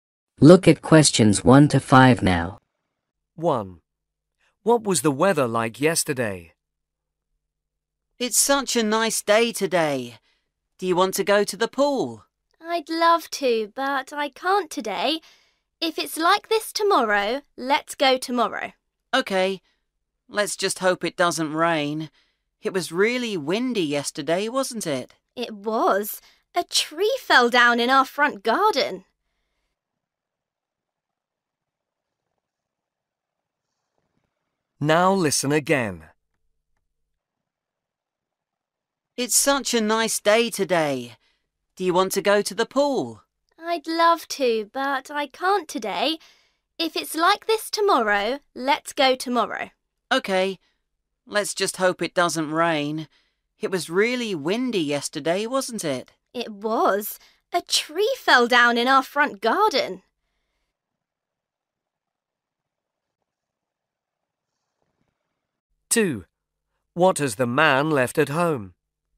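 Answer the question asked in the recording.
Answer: windy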